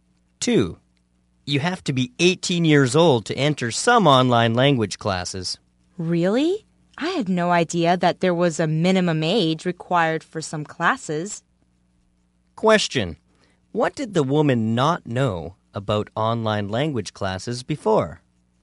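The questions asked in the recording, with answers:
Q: What did the woman not know about online language classes before?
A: That some classes have a minimum age (18).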